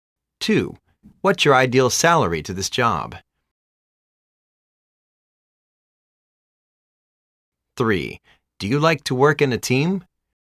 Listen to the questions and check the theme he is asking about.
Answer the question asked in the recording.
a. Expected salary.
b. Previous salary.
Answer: a. Expected salary.